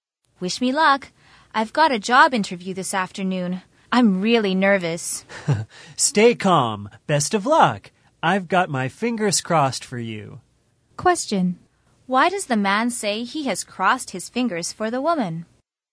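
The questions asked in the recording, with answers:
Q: Why does the man say he has crossed his fingers for the woman?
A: To wish her luck in her job interview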